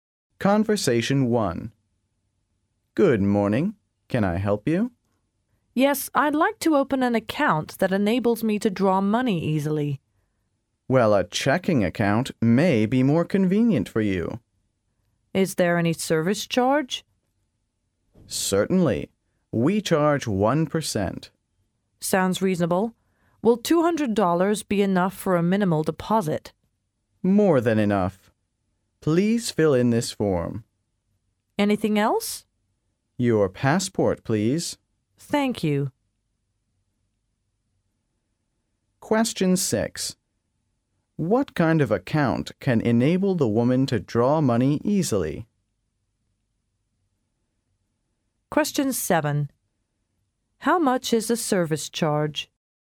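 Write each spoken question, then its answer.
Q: What kind of account can enable the woman to draw money easily?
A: A checking account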